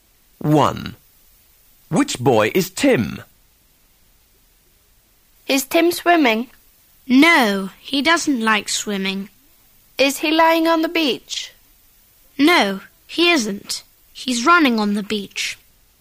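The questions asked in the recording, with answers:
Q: Which boy is Tim?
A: The boy running on the beach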